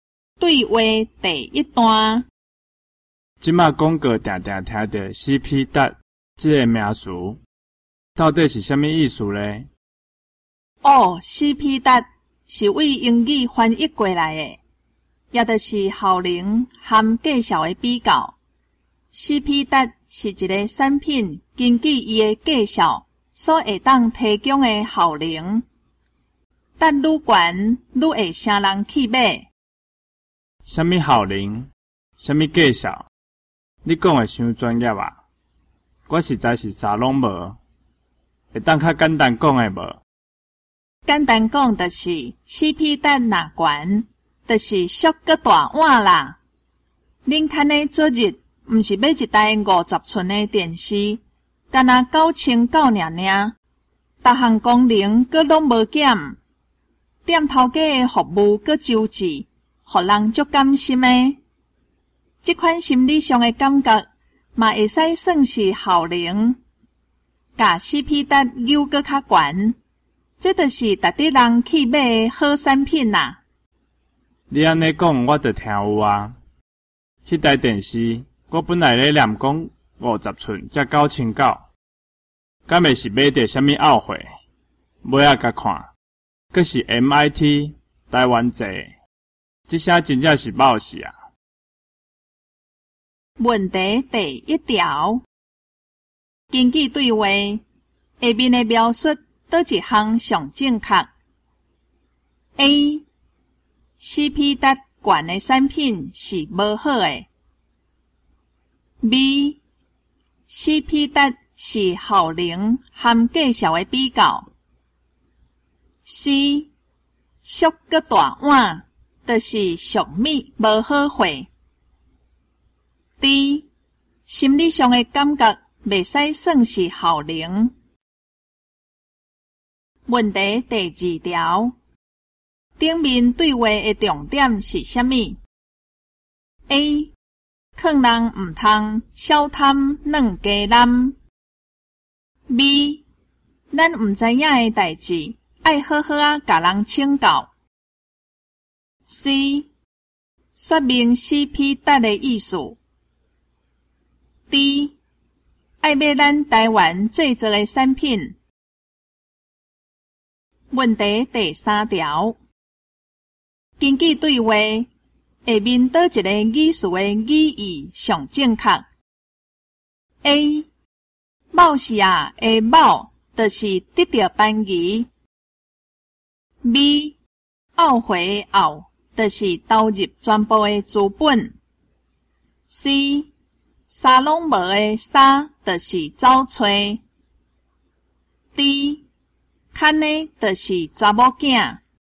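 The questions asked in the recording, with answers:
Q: 根据对话下面的描述,哪一项上正确?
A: B: CP 值是效能和计效的比较。

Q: 顶面对话的重点是什么 ?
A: C: 说明 CP 值的意思。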